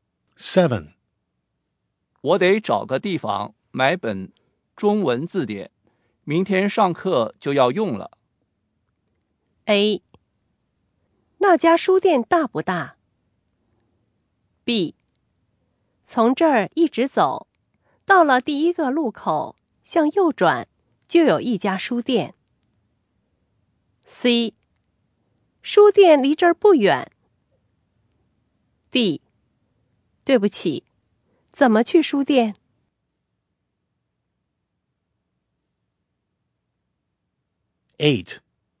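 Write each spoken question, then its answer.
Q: 我得找个地方买本中文字典,明天上课就要用了。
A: B: 从这儿一直走,到了第一个路口,向右转,就有一家书店。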